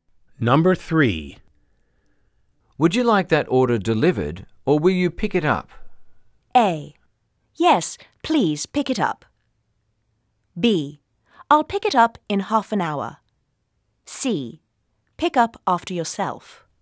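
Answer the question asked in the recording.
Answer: B: I'll pick it up in half an hour.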